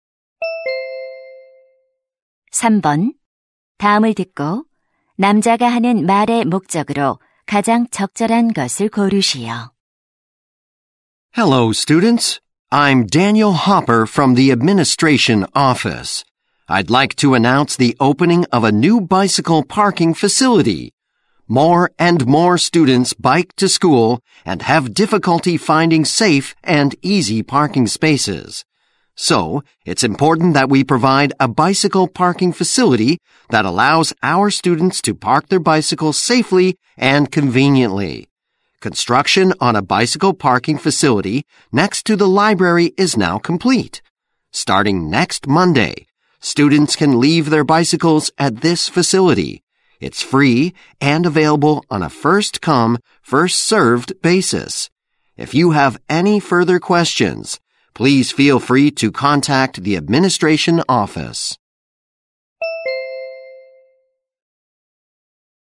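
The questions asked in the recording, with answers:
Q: 다음을 듣고 남자가 하는 말의 목적으로 가장 적절한 것을 고르시오.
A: 새 자전거 주차 시설 개장을 알리려고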